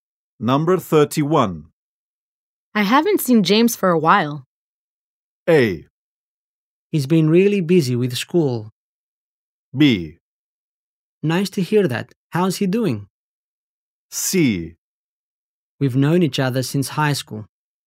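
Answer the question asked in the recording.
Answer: A: He's been really busy with school.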